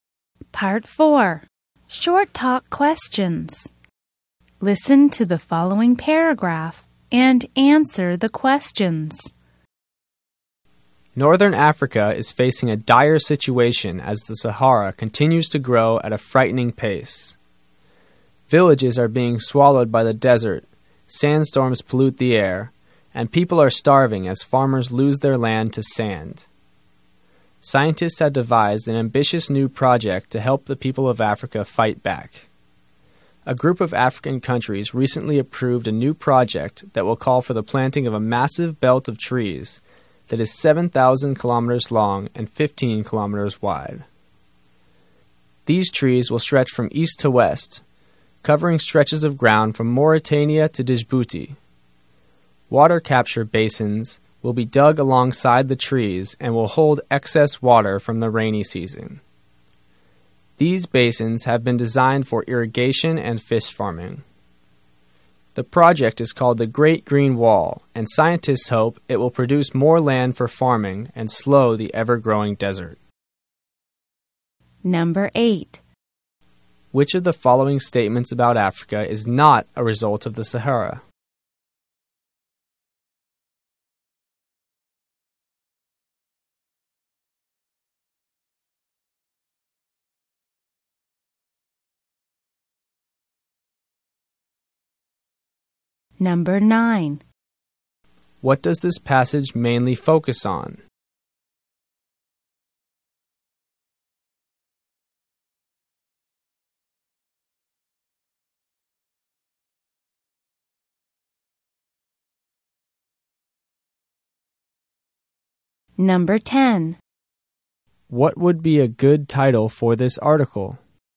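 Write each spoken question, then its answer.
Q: What does this passage mainly focus on?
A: A project to plant a huge belt of trees to fight the spread of the Sahara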